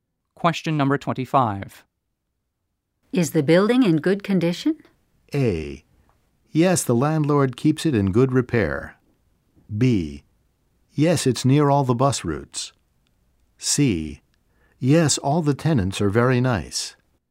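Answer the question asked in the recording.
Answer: A: Yes, the landlord keeps it in good repair.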